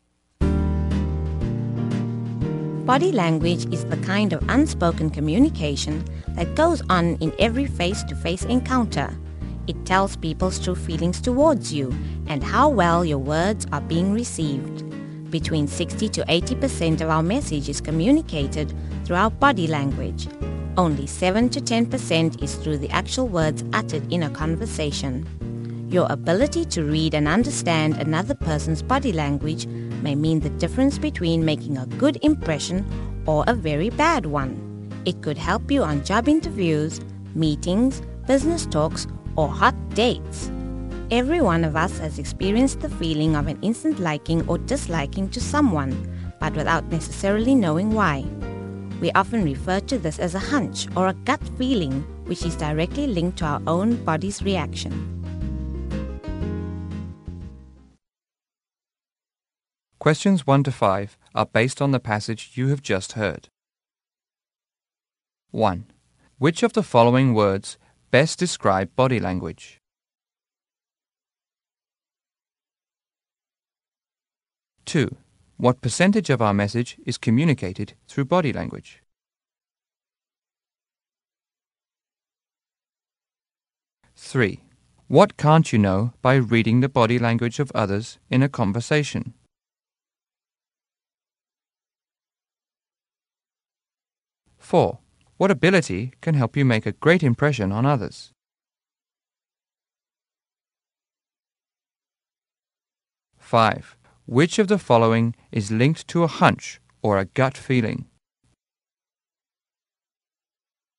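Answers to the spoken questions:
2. 60 to 80%
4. Reading and understanding another person's body language
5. Our own body's reaction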